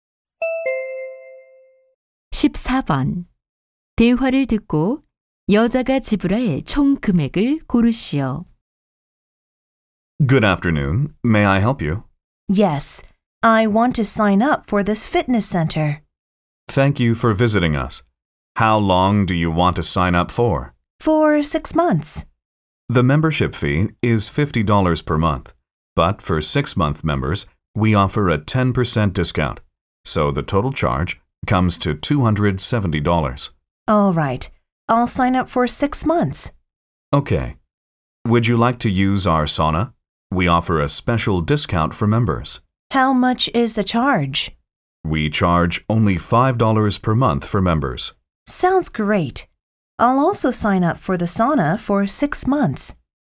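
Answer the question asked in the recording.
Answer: $300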